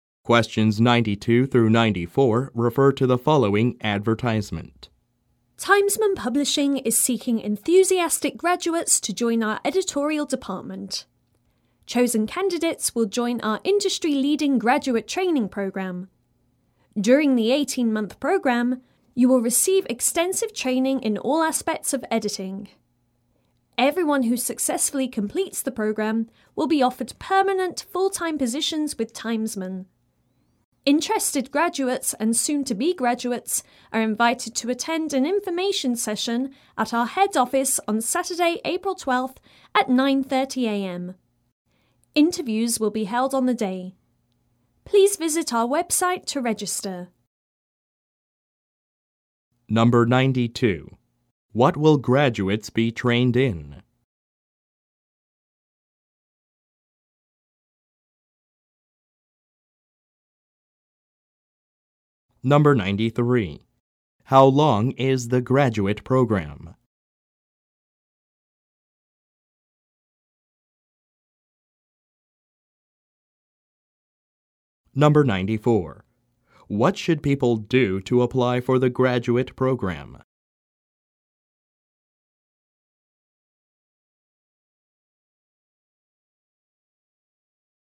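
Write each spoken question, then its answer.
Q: What will graduates be trained in?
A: Editing

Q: How long is the graduate program?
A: 18 months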